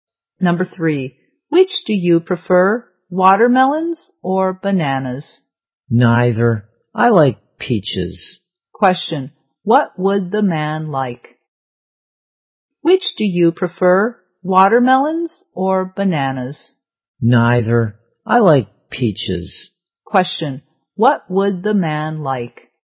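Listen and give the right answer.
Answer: Peaches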